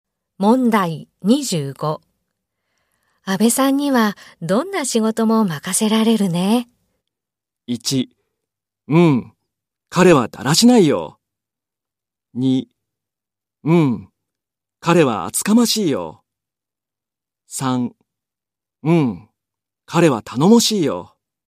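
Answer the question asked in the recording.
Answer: 3: うん。彼は頼もしいよ。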